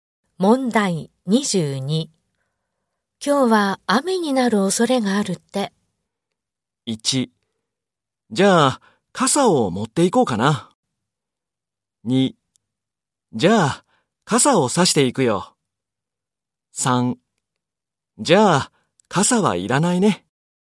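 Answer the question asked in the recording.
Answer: 1: じゃあ、傘を持っていこうかな。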